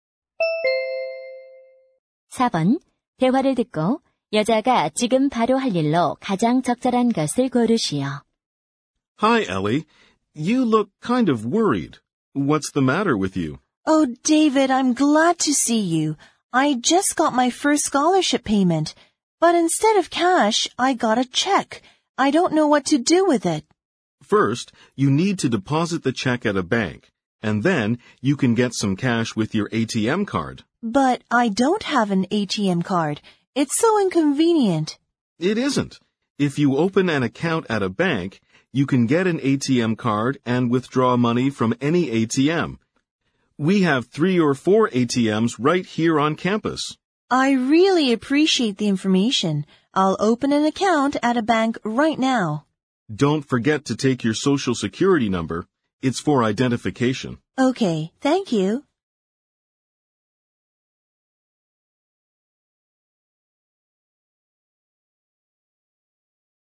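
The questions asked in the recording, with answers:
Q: 대화를 듣고 여자가 지금 바로 할 일로 가장 적절한 것을 고르시오.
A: 은행 계좌 개설하기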